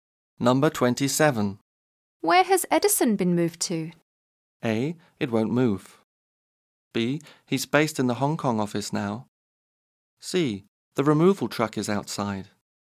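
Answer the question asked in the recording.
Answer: B: He's based in the Hong Kong office now.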